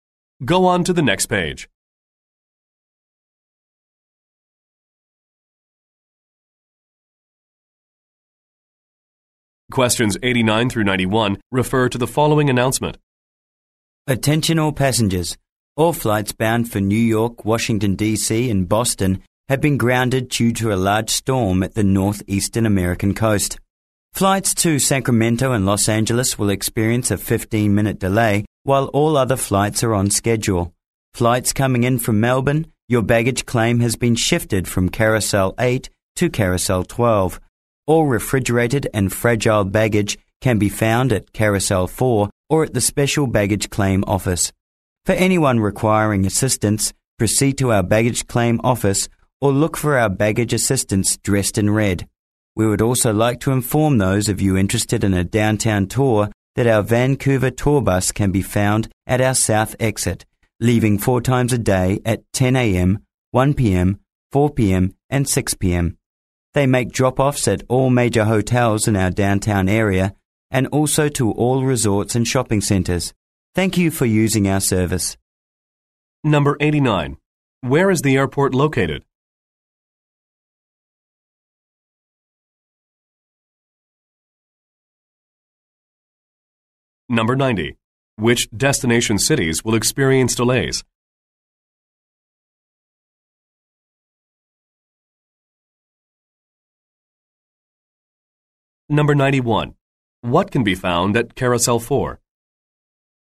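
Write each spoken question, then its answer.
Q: Which destination cities will experience delays?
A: Sacramento and Los Angeles

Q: What can be found at Carousel 4?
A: Refrigerated and fragile baggage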